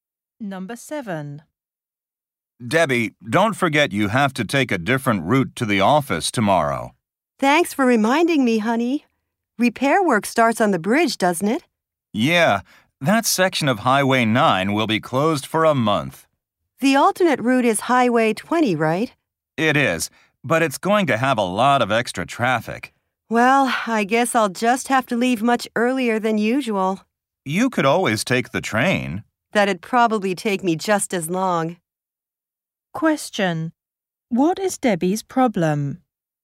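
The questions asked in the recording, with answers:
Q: What is Debbie's problem?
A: Her commute will take longer because the bridge on Highway 9 is closed.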